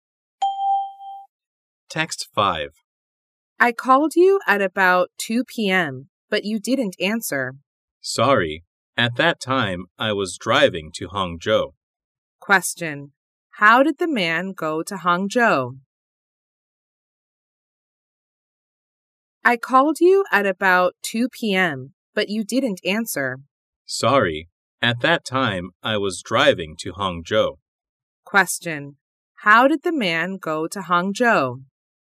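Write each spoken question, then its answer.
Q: How did the man go to Hangzhou?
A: By car (he drove)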